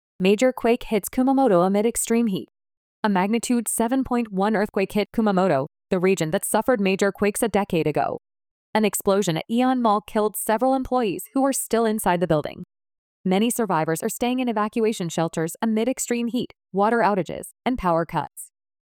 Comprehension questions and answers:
次の各質問の答えを探しながらリスニングし、英語または日本語で答えてください。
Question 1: What happened at AEON Mall?(イオンモールで何が起きましたか。)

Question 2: What difficulties are many survivors facing? (多くの被災者はどんな困難に直面していますか。)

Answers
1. An explosion killed several employees inside the building.
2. Extreme heat, water outages, and power cuts.

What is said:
Major Quake Hits Kumamoto amid Extreme Heat
A magnitude 7.1 earthquake hit Kumamoto, the region that suffered major quakes a decade ago.
An explosion at AEON Mall killed several employees who were still inside the building.
Many survivors are staying in evacuation shelters amid extreme heat, water outages, and power cuts.